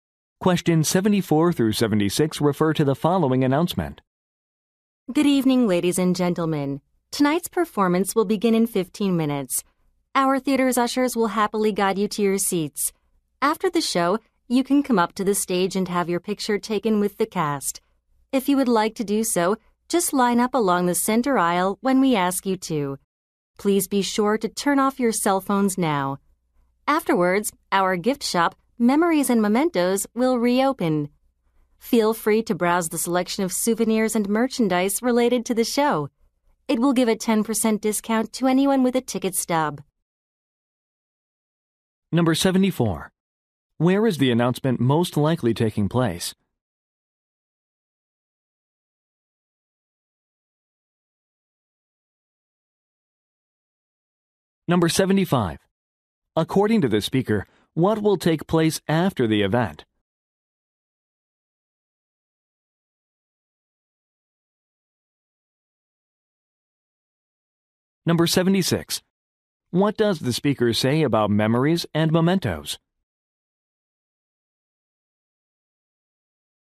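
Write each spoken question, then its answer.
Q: Where is the announcement most likely taking place?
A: In a theater

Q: According to the speaker, what will take place after the event?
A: Audience members can have their picture taken with the cast

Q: What does the speaker say about memories and mementos?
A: It gives a 10% discount to anyone with a ticket stub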